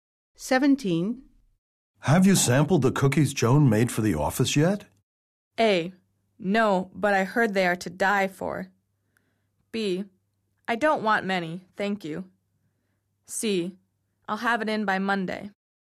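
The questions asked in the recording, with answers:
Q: Have you sampled the cookies Joan made for the office yet?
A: A: No, but I heard they are to die for.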